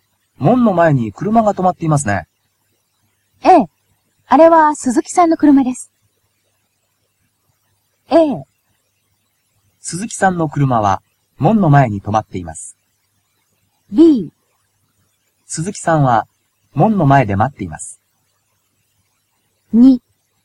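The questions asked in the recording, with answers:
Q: 門の前に車が止まっていますね。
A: A: 鈴木さんの車は門の前に止まっています。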